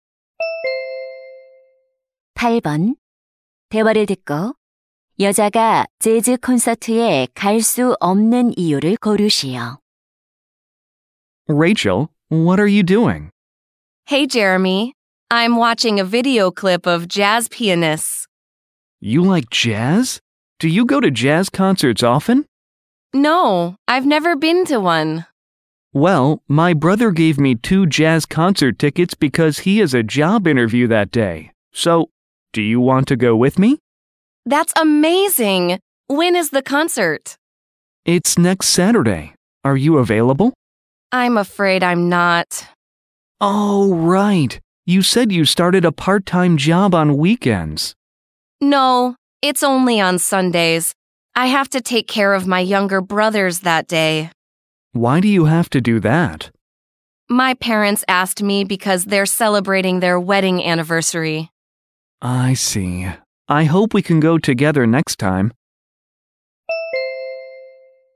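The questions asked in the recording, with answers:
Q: 여자가 재즈 콘서트에 갈 수 없는 이유를 고르시오.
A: 남동생들을 돌봐야 해서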